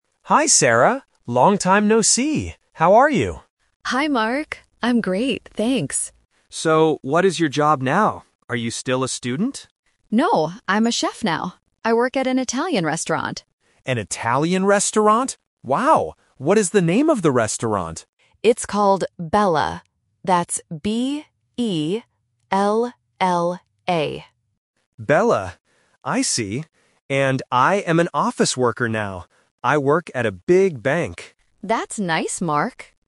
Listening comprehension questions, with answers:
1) What is Sarah's job?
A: A chef

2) Where does Sarah work?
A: At an Italian restaurant

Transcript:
Mark: Hi, Sarah! Long time no see. How are you?
Sarah: Hi, Mark! I'm great, thanks.
Mark: So, what is your job now? Are you still a student?
Sarah: No, I'm a chef now. I work at an Italian restaurant.
Mark: An Italian restaurant? Wow! What is the name of the restaurant?
Mark: Bella. I see. And I am an office worker now. I work at a big bank.

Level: A1